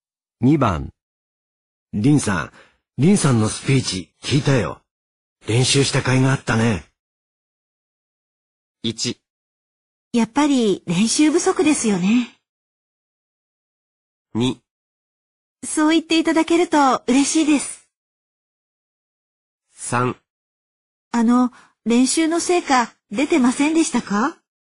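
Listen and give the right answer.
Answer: 2: そう言っていただけると嬉しいです。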